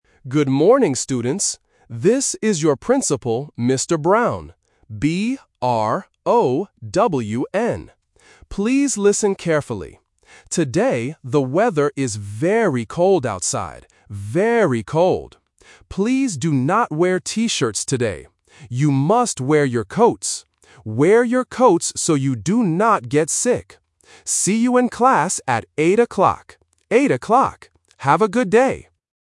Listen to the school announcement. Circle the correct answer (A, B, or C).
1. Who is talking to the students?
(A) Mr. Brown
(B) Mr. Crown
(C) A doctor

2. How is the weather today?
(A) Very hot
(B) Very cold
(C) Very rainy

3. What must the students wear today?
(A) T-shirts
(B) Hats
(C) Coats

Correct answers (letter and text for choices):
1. (A) Mr. Brown
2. (B) Very cold
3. (C) Coats

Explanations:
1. The speaker explicitly introduces himself as "Mr. Brown" and spells his name "B-R-O-W-N". Option B (Mr. Crown) is a phonetic trap because "Brown" and "Crown" rhyme and sound very similar. Option C (A doctor) is a plausible person to talk about getting sick, but he says he is the principal.
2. The principal clearly says, "the weather is very cold outside," and repeats the phrase "Very cold." Option A (hot) is a trap using the exact opposite weather condition. Option C (rainy) is a plausible weather condition but is not mentioned in the audio.
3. The principal gives a direct instruction: "You must wear your coats." Option A (T-shirts) is the main trap because the principal mentions T-shirts, but tells the students not to wear them ("do not wear T-shirts today"). Option B (Hats) is a logical thing to wear in the cold, but it is not mentioned.

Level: A1